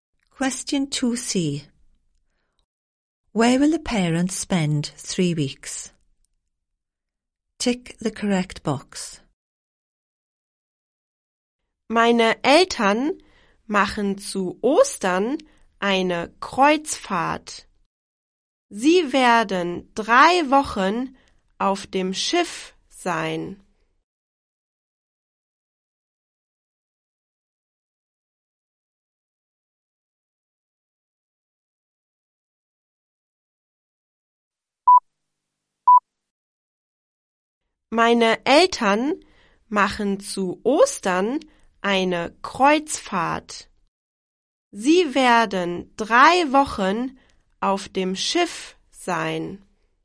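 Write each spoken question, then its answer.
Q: Where will the parents spend 3 weeks?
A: On a ship (cruise)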